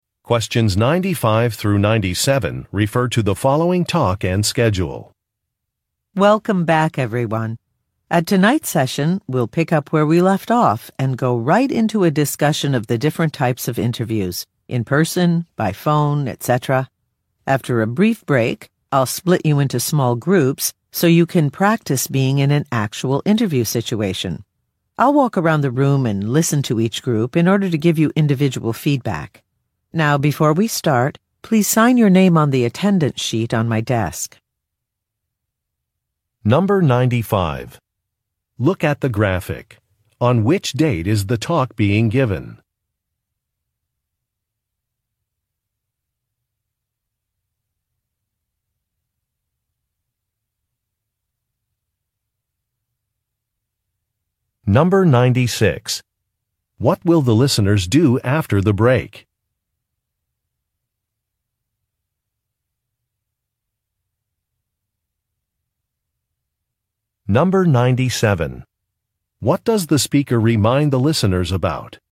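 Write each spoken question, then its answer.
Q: What will the listeners do after the break?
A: Practice interviews in small groups

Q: What does the speaker remind the listeners about?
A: To sign the attendance sheet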